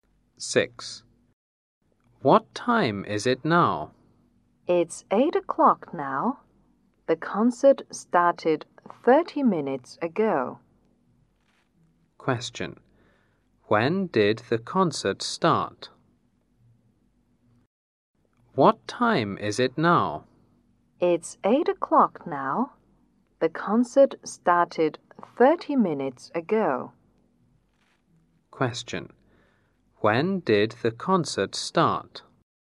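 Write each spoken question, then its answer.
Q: When did the concert start?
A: At 7:30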